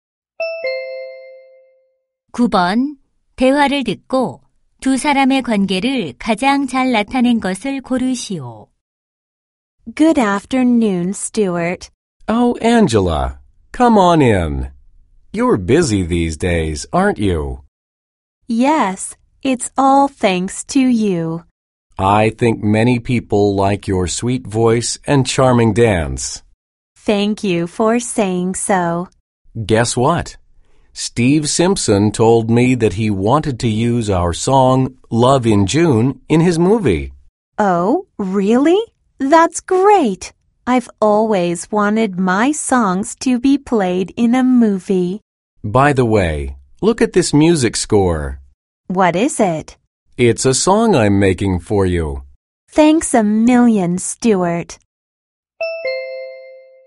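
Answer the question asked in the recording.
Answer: 가수 - 작곡가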